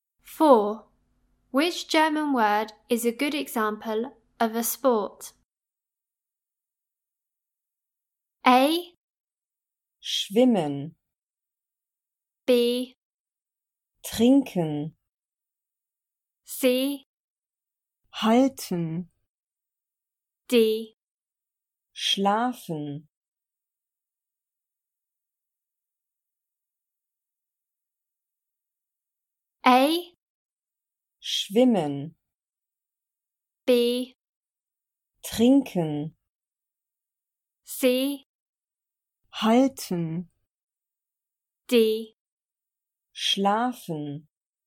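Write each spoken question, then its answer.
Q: Which German word is a good example of a sport?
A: A: Schwimmen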